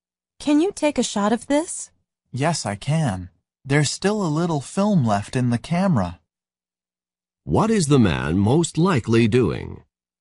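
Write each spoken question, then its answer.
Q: What is the man most likely doing?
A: Taking a photograph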